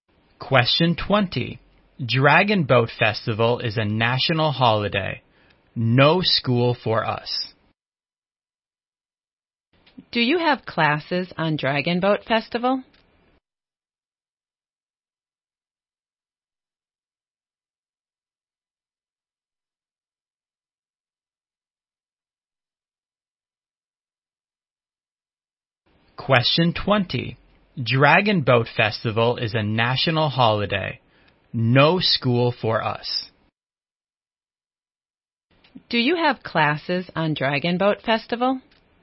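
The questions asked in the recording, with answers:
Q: Do you have classes on Dragon Boat Festival?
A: No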